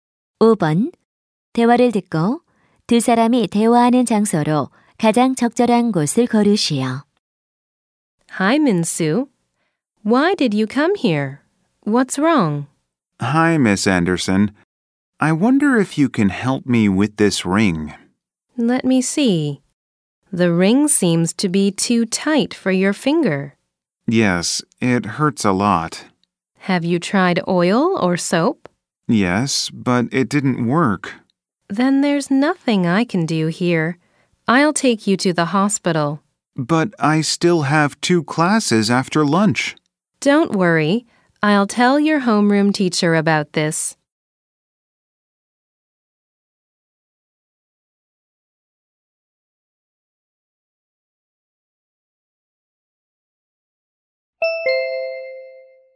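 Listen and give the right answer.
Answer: 학교 보건실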